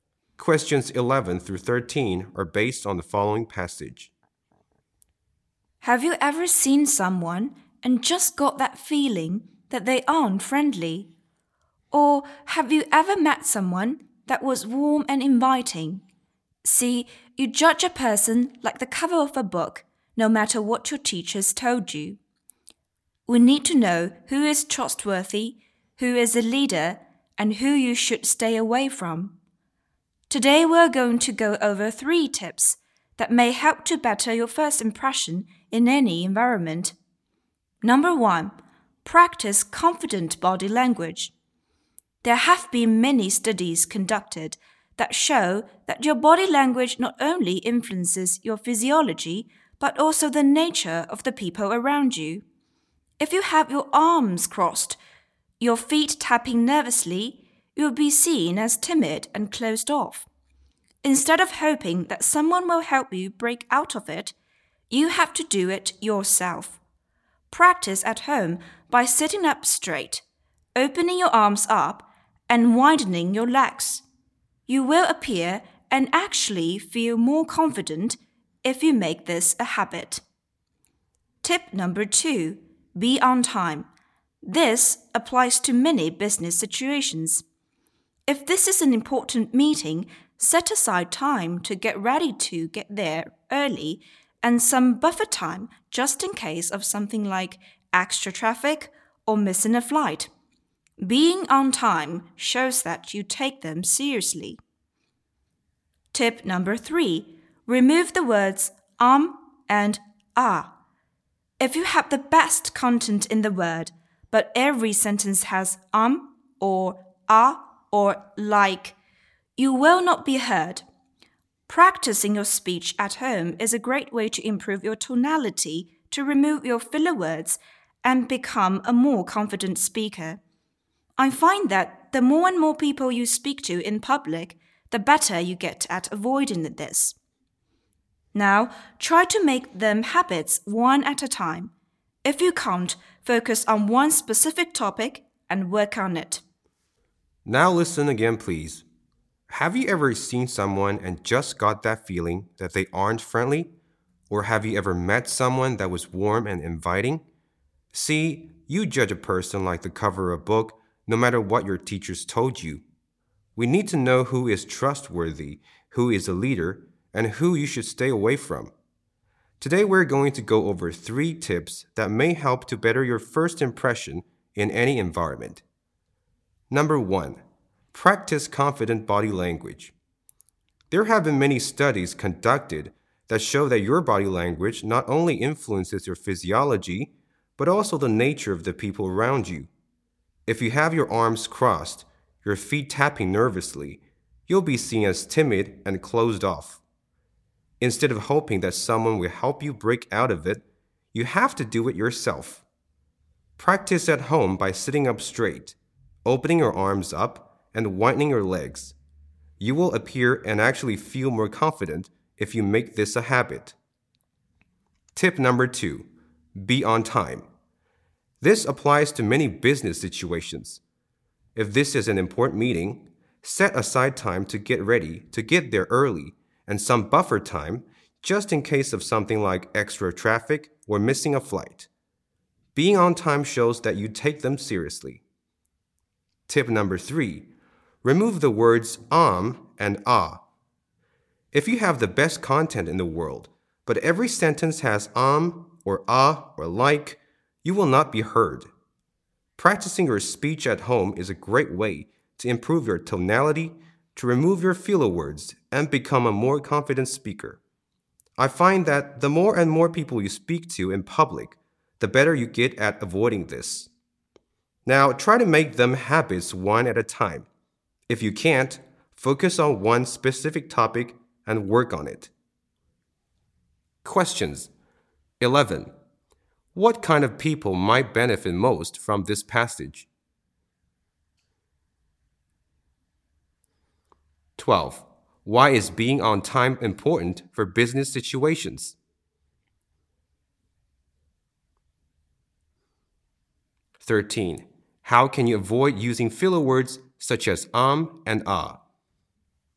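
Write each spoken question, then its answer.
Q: Why is being on time important for business situations?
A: It shows you take them seriously

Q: How can you avoid using filler words such as and ah?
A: By practicing your speech at home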